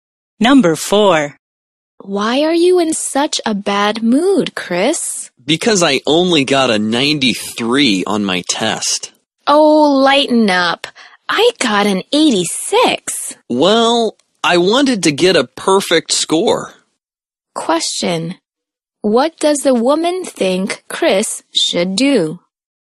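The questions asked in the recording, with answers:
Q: What does the woman think Chris should do?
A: Lighten up; not be upset about his score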